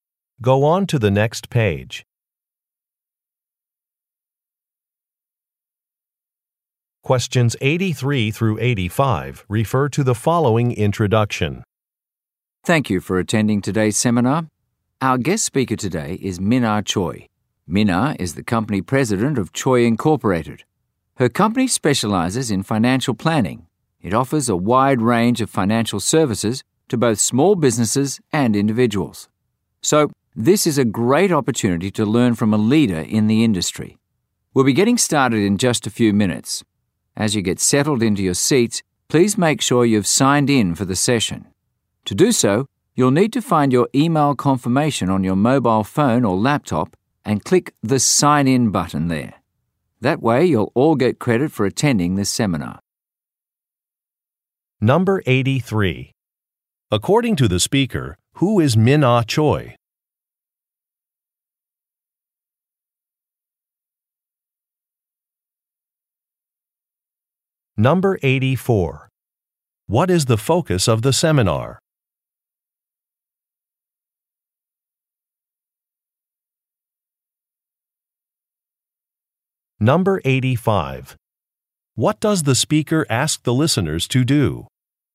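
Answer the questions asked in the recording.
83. A company president
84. Financial planning
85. Sign in for the session using the email confirmation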